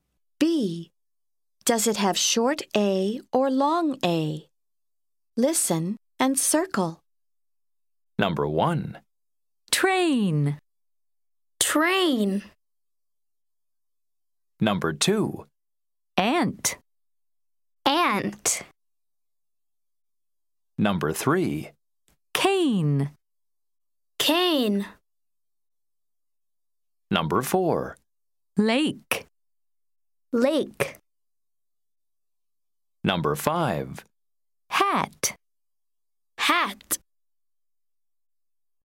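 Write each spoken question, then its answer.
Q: Train.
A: long A

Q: Cane.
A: long A

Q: Lake.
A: long A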